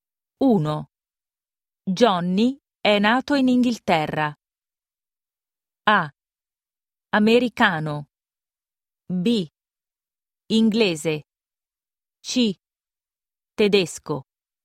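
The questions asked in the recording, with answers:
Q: Johnny è nato in Inghilterra.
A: B: Inglese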